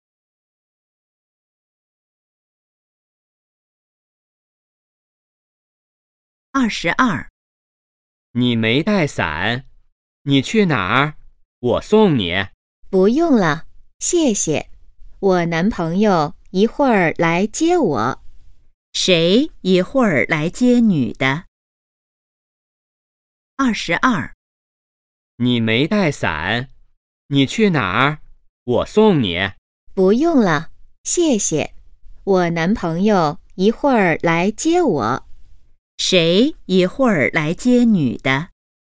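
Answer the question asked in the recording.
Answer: 她男朋友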